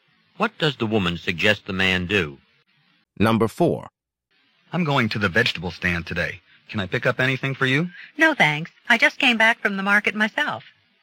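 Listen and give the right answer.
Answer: She doesn't need anything because she just went to the market.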